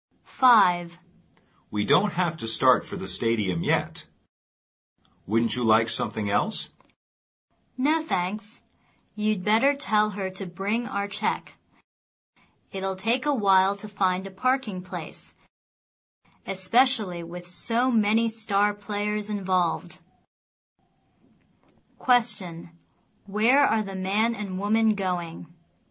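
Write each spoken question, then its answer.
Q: Where are the man and woman going?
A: To the stadium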